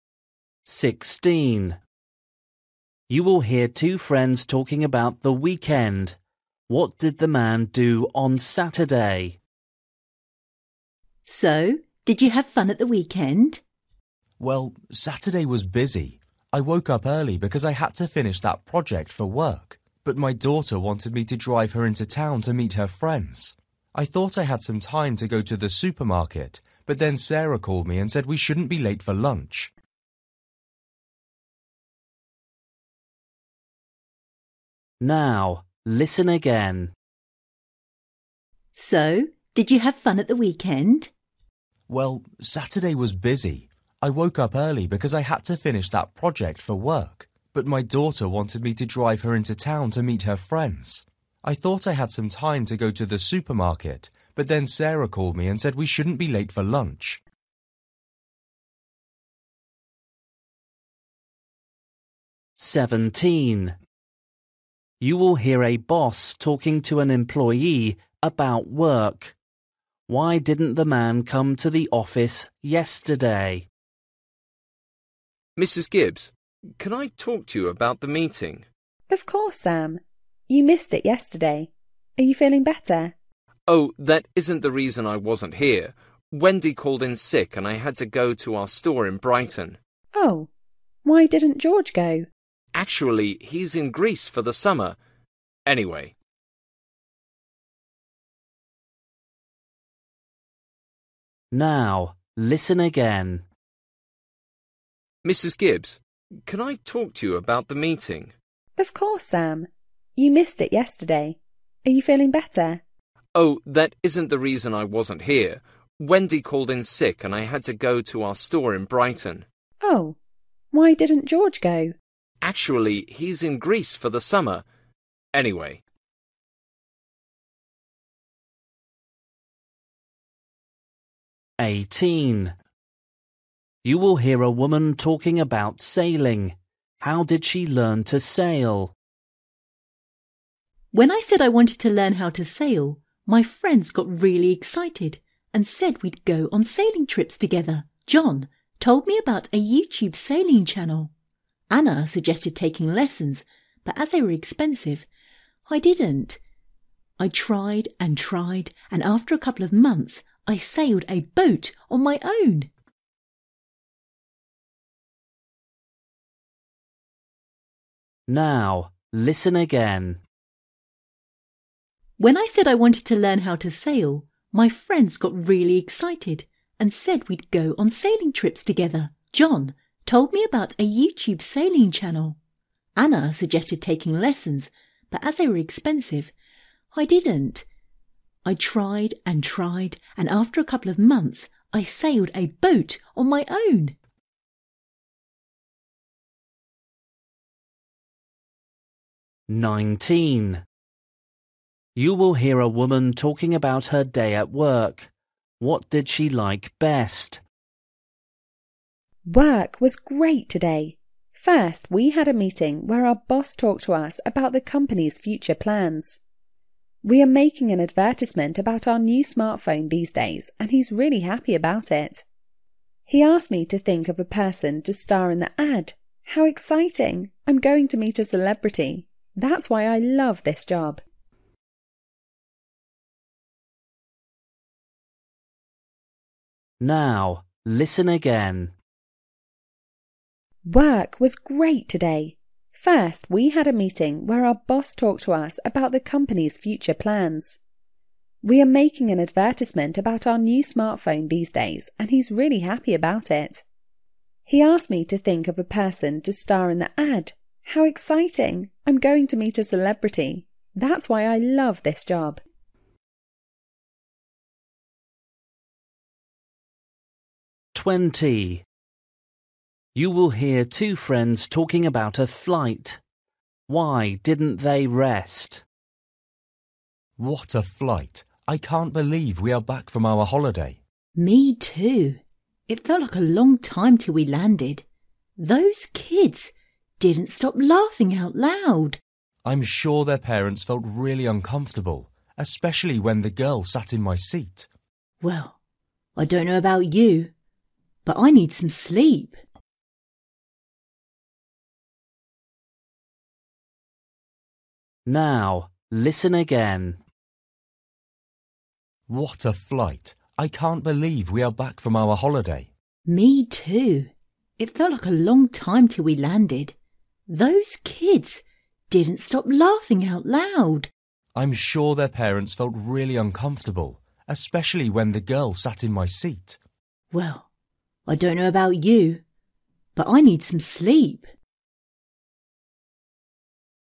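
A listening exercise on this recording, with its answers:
For each question, choose the correct answer.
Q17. You will hear a boss talking to an employee about work. Why didn't the man come to the office yesterday?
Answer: He had to go to the store in Brighton because Wendy was sick

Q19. You will hear a woman talking about her day at work. What did she like best?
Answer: Going to meet a celebrity for the advert

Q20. You will hear two friends talking about a flight. Why didn't they rest?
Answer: Some kids kept laughing out loud

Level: Luyện nghe trình độ A2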